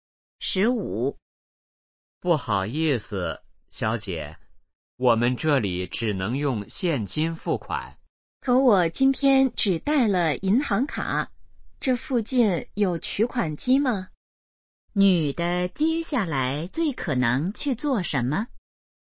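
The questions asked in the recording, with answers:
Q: 女的接下来最可能去做什么?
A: 去取款机取钱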